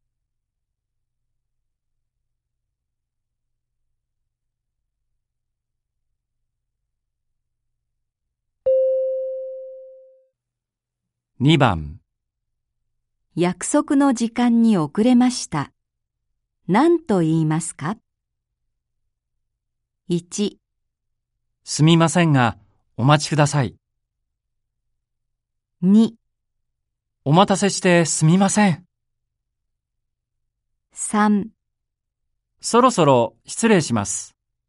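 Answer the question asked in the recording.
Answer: 2: お待たせしてすみません。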